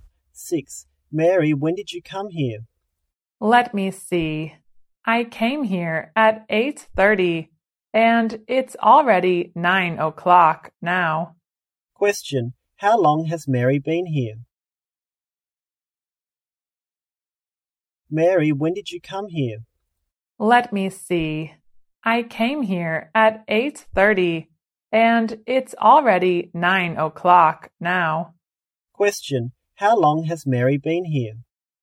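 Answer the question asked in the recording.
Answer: For half an hour (30 minutes)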